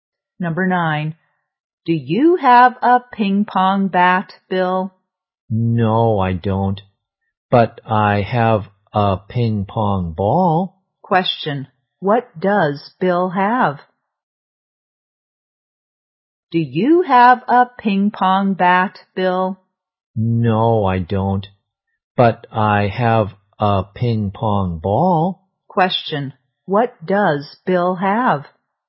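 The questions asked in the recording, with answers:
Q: Question, what does Bill have?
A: A ping pong ball.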